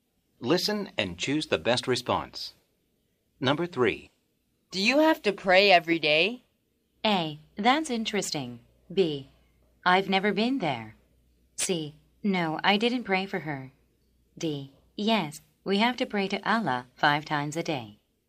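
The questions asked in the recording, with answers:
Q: Do you have to pray every day?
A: D: Yes, we have to pray to Allah 5 times a day.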